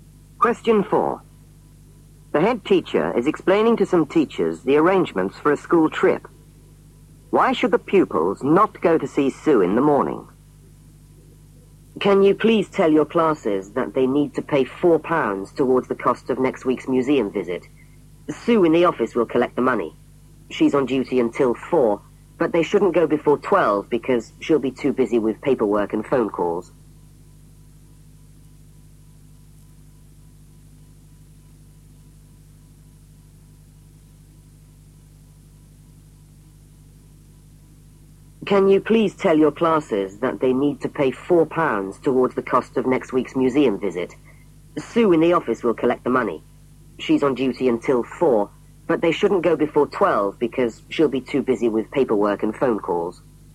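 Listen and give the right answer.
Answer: She'll be too busy with paperwork and phone calls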